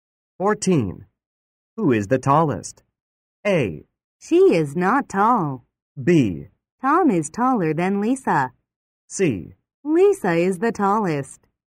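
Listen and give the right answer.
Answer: C: Lisa is the tallest.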